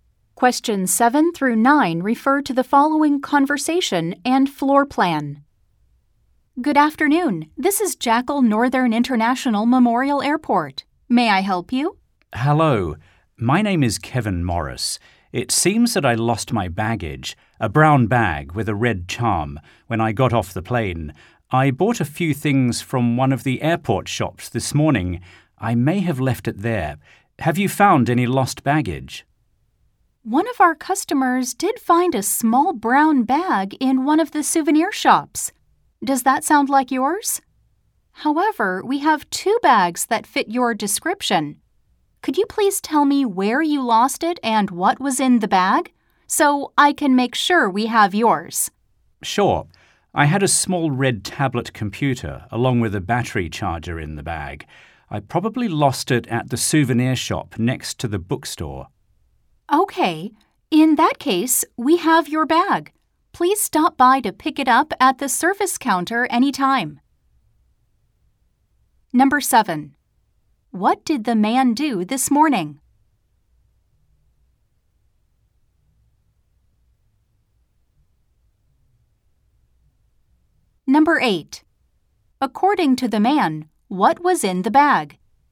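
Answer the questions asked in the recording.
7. He bought a few things at an airport shop.
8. A small red tablet computer and a battery charger.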